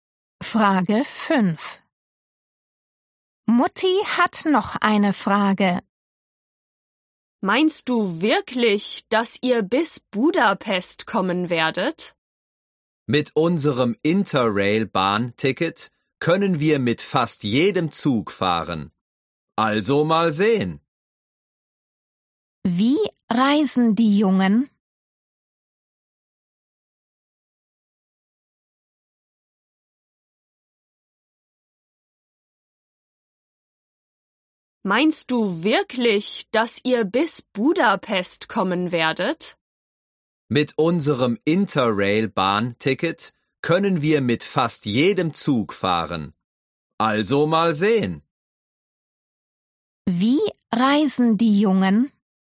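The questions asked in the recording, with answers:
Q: Wie reisen die Jungen?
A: mit dem Zug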